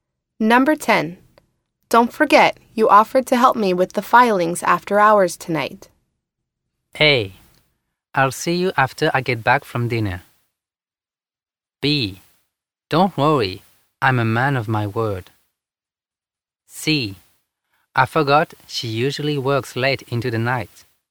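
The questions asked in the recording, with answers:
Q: Don't forget, you offered to help me with the filings after hours tonight.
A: B: Don't worry, I'm a man of my word.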